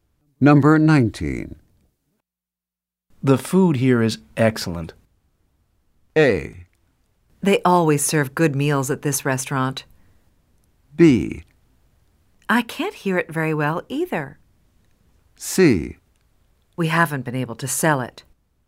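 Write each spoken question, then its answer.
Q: The food here is excellent.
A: A: They always serve good meals at this restaurant.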